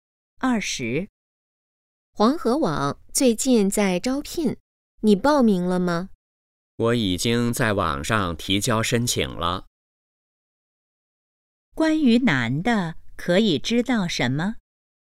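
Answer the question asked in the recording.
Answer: 已经在网上提交了申请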